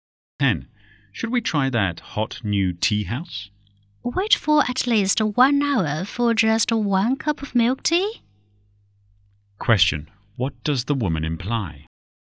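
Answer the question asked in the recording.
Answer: She doesn't want to go because the wait is too long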